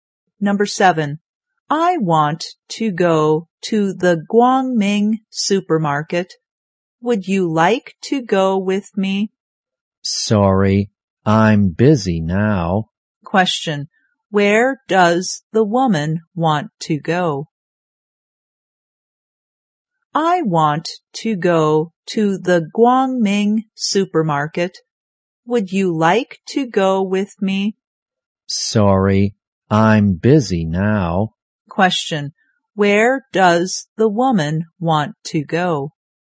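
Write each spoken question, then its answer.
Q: Question, where does the woman want to go?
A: The Guangming supermarket.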